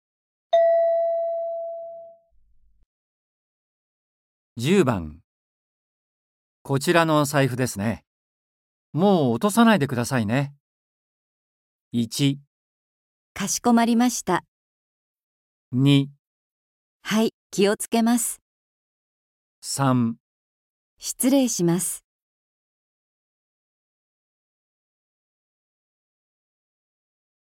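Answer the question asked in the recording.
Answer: 2

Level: N4.36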